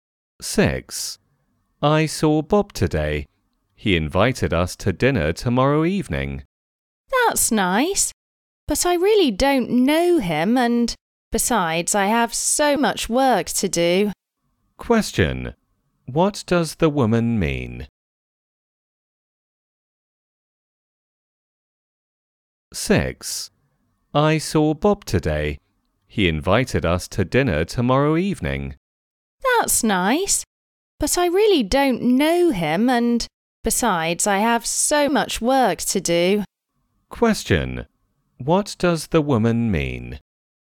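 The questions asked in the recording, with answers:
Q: What does the woman mean?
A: She doesn't want to go to Bob's dinner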